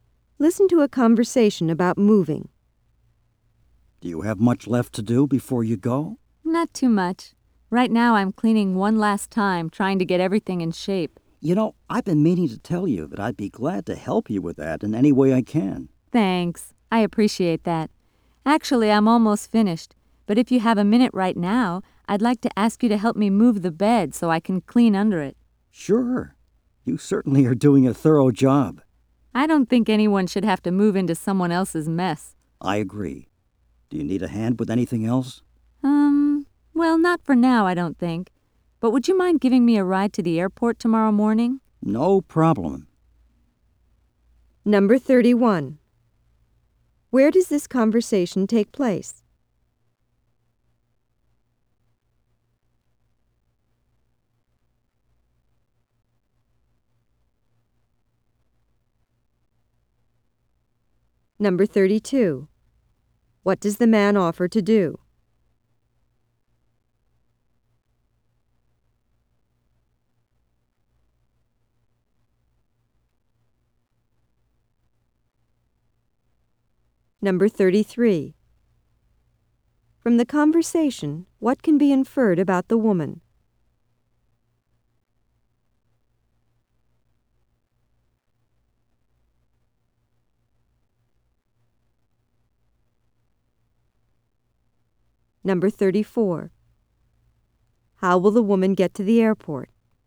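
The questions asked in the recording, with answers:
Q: What does the man offer to do?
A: Help her with the cleaning and moving out

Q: How will the woman get to the airport?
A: The man will drive her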